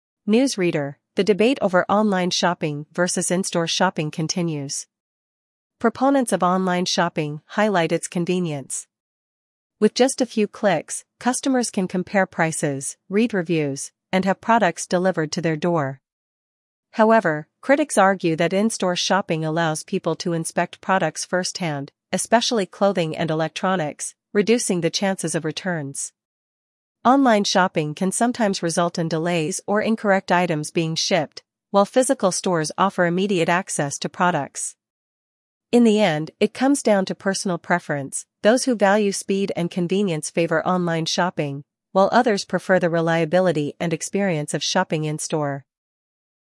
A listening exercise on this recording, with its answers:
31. What advantage of online shopping is mentioned first?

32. How can online shopping help customers make decisions?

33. Why do critics favor in-store shopping?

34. What issues can occur with online shopping?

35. What benefit do physical stores provide?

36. What is one example of a product category where in-store shopping is preferred?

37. What does the speaker suggest the choice depends on?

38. What two shopping options are compared in the debate?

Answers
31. Convenience
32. Compare prices and read reviews
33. Inspecting products firsthand
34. Delays or incorrect items
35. Immediate access
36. Clothing or electronics
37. Personal preference
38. Online shopping vs. in-store shopping

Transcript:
News Reader: The debate over online shopping versus in-store shopping continues. Proponents of online shopping highlight its convenience. With just a few clicks, customers can compare prices, read reviews, and have products delivered to their door.
However, critics argue that in-store shopping allows people to inspect products firsthand, especially clothing and electronics, reducing the chances of returns.
Online shopping can sometimes result in delays or incorrect items being shipped, while physical stores offer immediate access to products.
In the end, it comes down to personal preference—those who value speed and convenience favor online shopping, while others prefer the reliability and experience of shopping in-store.